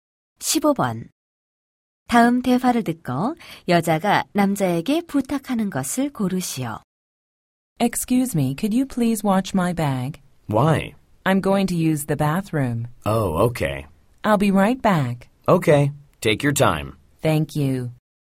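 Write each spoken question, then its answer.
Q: 다음 대화를 듣고 여자가 남자에게 부탁하는 것을 고르시오.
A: 가방을 봐 달라는 것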